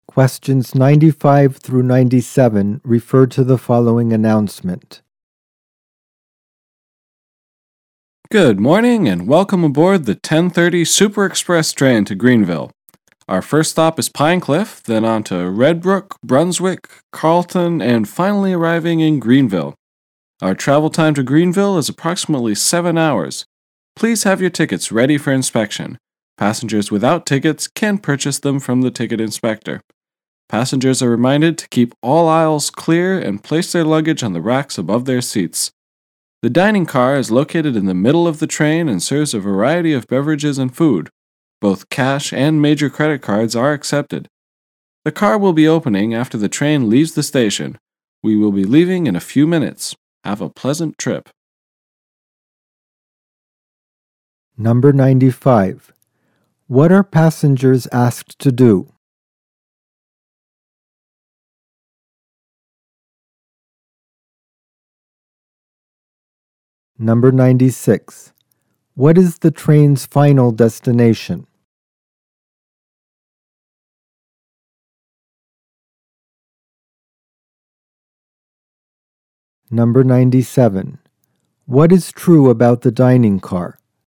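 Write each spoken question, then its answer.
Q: What is the train's final destination?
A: Greenville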